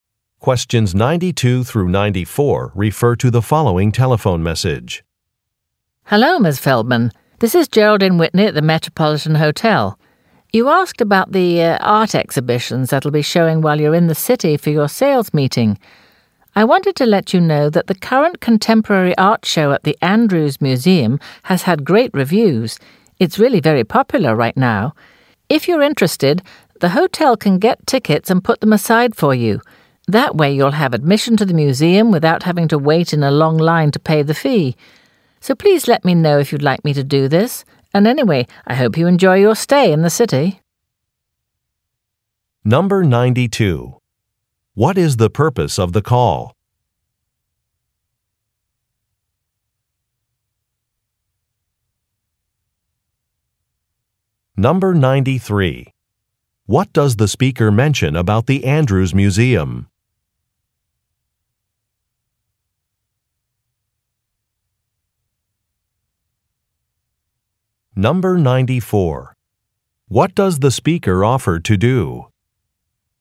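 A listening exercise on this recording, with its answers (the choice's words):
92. What is the purpose of the call?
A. To respond to an inquiry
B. To confirm a reservation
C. To apologize for an error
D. To ask about business hours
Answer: To respond to an inquiry

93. What does the speaker mention about the Andrews Museum?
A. It is being renovated.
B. It is located next to the hotel.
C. The current show is very good.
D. Admission is free of charge.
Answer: The current show is very good.

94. What does the speaker offer to do?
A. Issue a refund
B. Reschedule a meeting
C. Arrange a city tour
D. Purchase tickets in advance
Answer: Purchase tickets in advance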